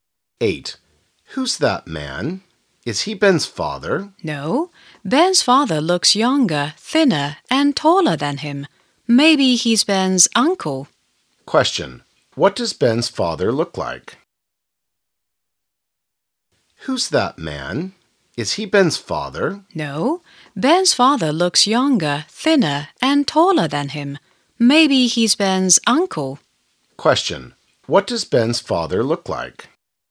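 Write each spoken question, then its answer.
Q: What does Ben's father look like?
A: Younger, thinner and taller than that man.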